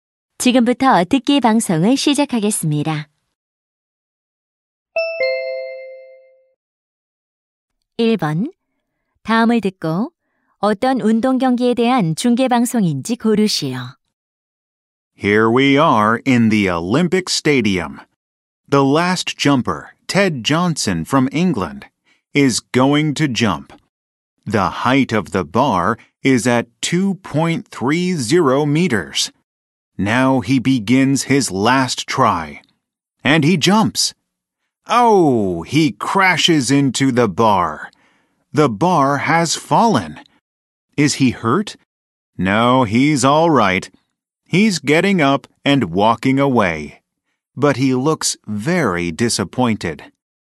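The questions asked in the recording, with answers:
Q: 다음을 듣고 어떤 운동 경기에 대한 중계 방송인지 고르시오.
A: 높이뛰기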